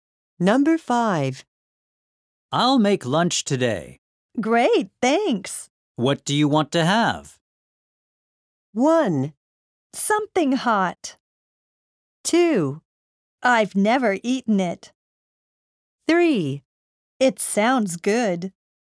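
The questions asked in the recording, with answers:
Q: What do you want to have?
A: 1: Something hot.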